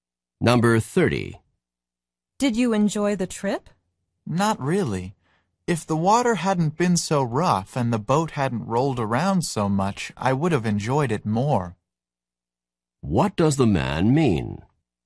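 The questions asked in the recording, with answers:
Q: What does the man mean?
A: He didn't enjoy the trip much because the water was rough and the boat rolled.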